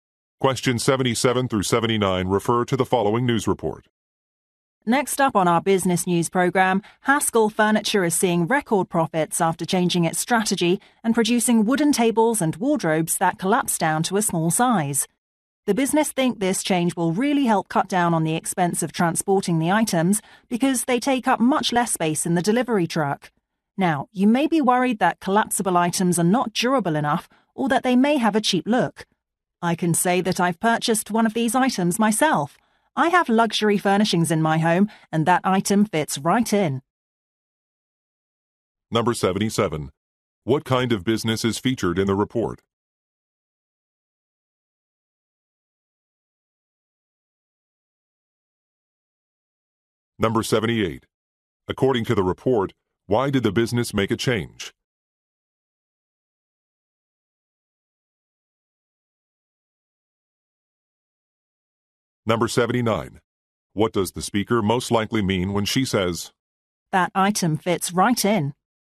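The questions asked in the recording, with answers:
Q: What kind of business is featured in the report?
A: A furniture maker

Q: According to the report, why did the business make a change?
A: To cut transportation costs

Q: What does the speaker most likely mean when she says,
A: The collapsible furniture looks high-quality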